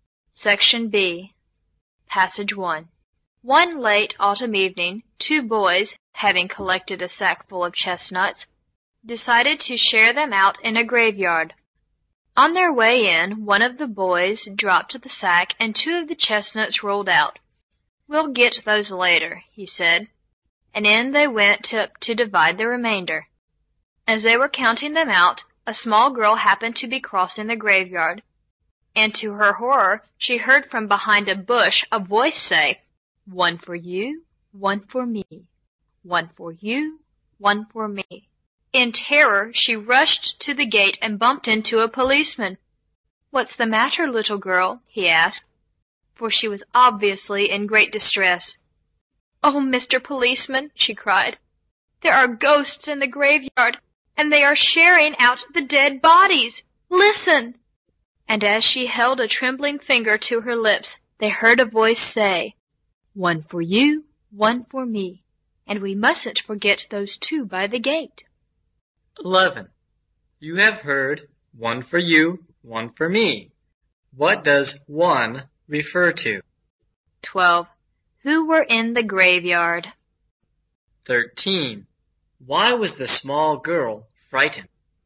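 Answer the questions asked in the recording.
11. A chestnut
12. Two boys
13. She thought ghosts were sharing out dead bodies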